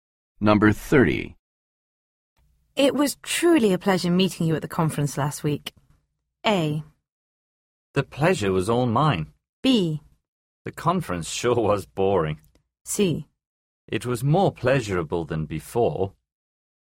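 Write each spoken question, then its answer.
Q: It was truly a pleasure meeting you at the conference last week.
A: A: The pleasure was all mine.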